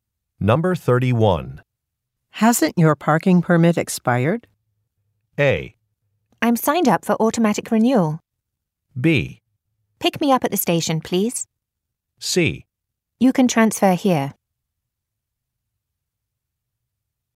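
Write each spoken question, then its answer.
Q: Hasn't your parking permit expired?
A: A: I'm signed up for automatic renewal.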